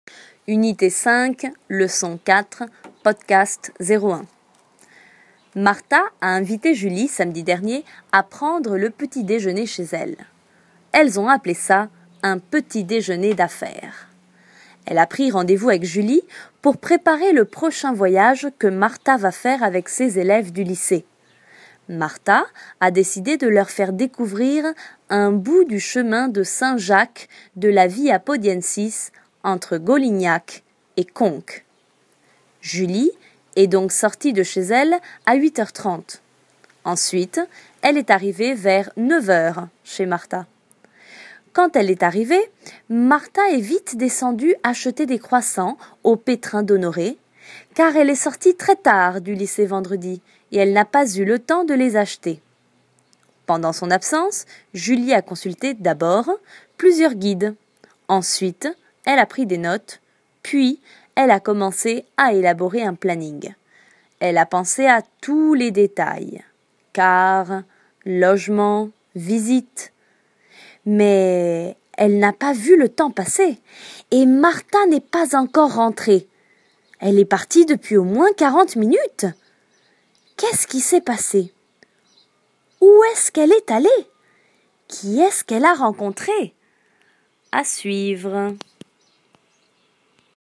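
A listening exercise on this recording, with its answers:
Escucha el audio y completa en passé composé con los siguientes verbos:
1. Marta Julie, samedi dernier, à prendre le petit déjeuner chez elle.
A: a invité

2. Elles ça : Un « petit déjeuner d'affaires ».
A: ont appelé

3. Elle rendez-vous avec Julie pour préparer le prochain voyage que Marta va faire avec ses élèves du lycée.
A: a pris

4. Marta de leur faire découvrir un bout du chemin de Saint-Jacques de la Via Podiensis entre GOLINHAC et CONQUES.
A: a décidé

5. Ensuite, elle vers 9 h. chez Marta.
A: est arrivée

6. car elle très tard du lycée vendredi et elle n'a pas eu le temps de les acheter.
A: est sortie

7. Pendant son absence, Julie , d'abord, plusieurs guides,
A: a consulté

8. puis, elle à élaborer un planning.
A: a commencé

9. Elle à tous les détails (car, logement, visites...).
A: a pensé

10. Elle depuis au moins 40 minutes !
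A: est partie

Contesta verdadero o falso a las preguntas sobre el texto:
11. Julie est allée déjeuner chez Marta.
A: Vrai

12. Marta veut partir avec ses élèves découvrir une partie du chemin de Saint-Jacques.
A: Vrai

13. Julie a apporté des croissants.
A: Faux

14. Julie, avec l'aide de Marta, a élaboré le planning du voyage.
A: Faux

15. Marta est partie et n'est pas rentrée.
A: Vrai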